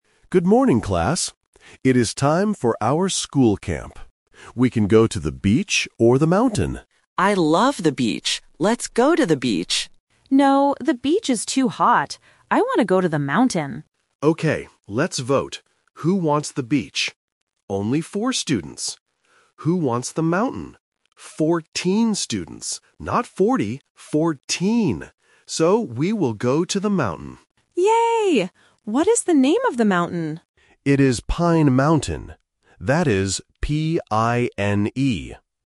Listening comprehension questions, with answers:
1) Where will the class go for the school camp?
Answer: To the mountain

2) How many students want to go to the mountain?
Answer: 14 students

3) How does the teacher spell the name of the mountain?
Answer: P-I-N-E

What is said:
Teacher: Good morning, class. It is time for our school camp. We can go to the beach or the mountain.
Boy: I love the beach! Let's go to the beach.
Girl: No, the beach is too hot. I want to go to the mountain.
Teacher: Okay, let's vote. Who wants the beach? Only four students. Who wants the mountain? So, we will go to the mountain.
Girl: Yay! What is the name of the mountain?

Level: A1